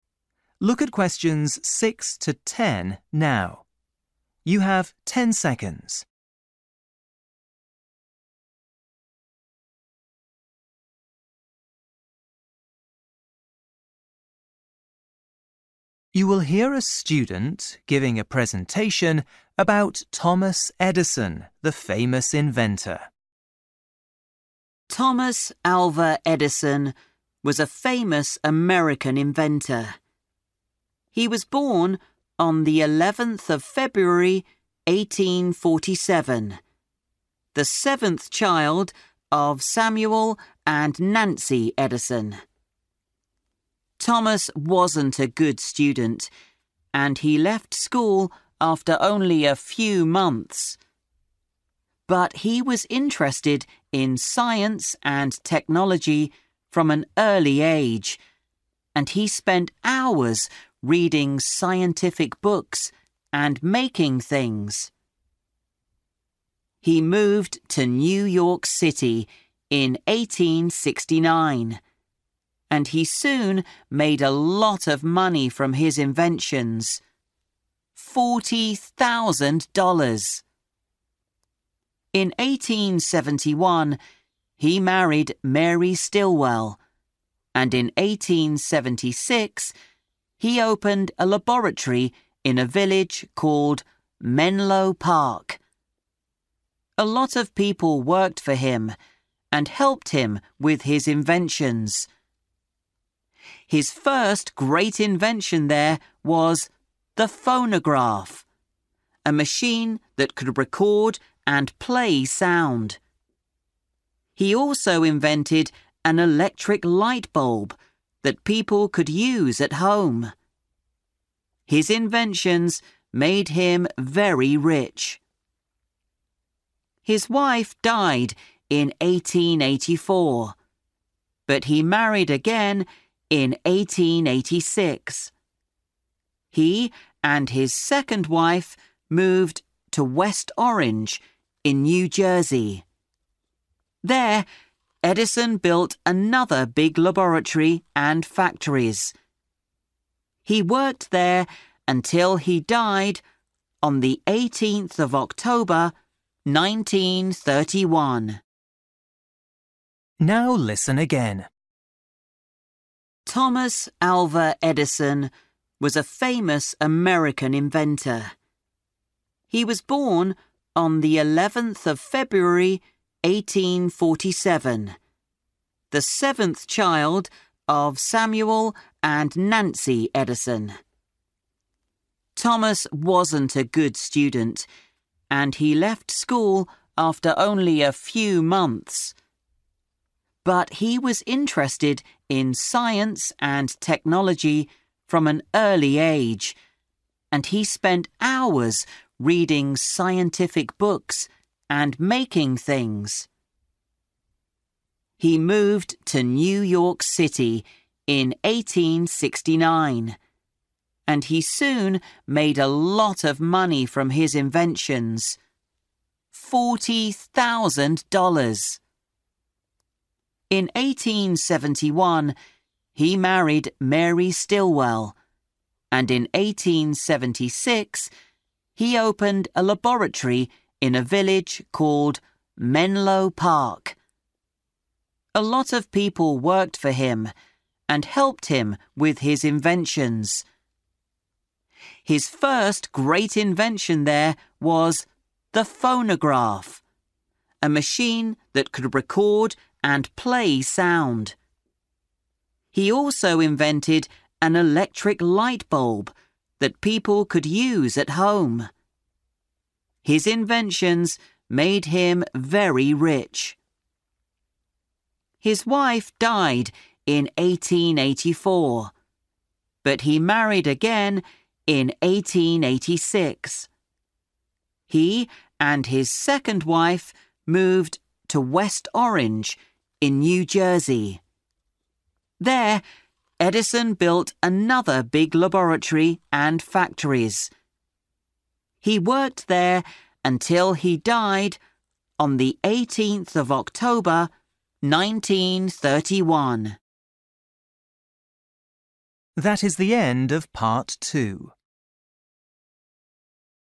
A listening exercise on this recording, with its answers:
For each question, write the correct answer in the gap. Write one word or a number or a date or a time.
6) 11 (6) ............ 1847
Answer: February

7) (7) $ ............ from his inventions.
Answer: 40,000

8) Opened a laboratory in Menlo (8) ...............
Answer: Park

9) His first wife, Mary Stilwell, (9) ...............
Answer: died

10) 18 October (10) ...............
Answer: 1931

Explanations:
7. He moved to New York City in 1869, and he soon made a lot of money from his inventions – $40,000.

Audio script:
1886:
Man: Thomas Alva Edison was a famous American inventor. He was born on 11th February, 1847, the seventh child of Samuel and Nancy Edison.
Thomas wasn't a good student and he left school after only a few months. But he was interested in science and technology from an early age, and he spent hours reading scientific books and making things.
He moved to New York City in 1869, and he soon made a lot of money from his inventions – $40,000.
In 1871, he married Mary Stilwell, and in 1876, he opened a laboratory in a village called Menlo Park. A lot of people worked for him and helped him with his inventions. His first great invention there was the phonograph, a machine that could record and play sound. He also invented an electric light bulb that people could use at home. His inventions made him very rich.
His wife died in 1884, but he married again in 1886. He and his second wife moved to West Orange, in New Jersey. There, Edison built another big laboratory and factories. He worked there until he died on the 18 October 1931.
Now listen again.

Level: KET (A2)